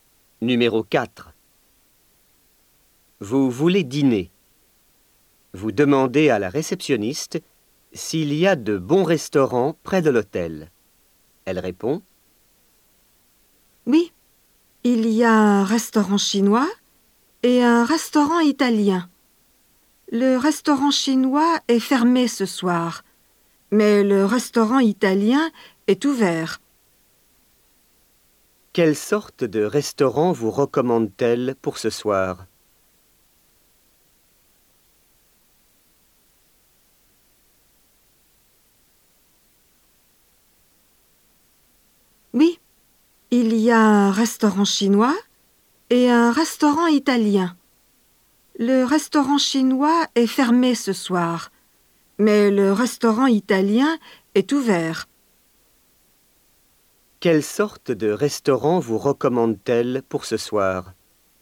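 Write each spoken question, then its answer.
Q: Quelle sorte de restaurant vous recommande-t-elle pour ce soir?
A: Un restaurant italien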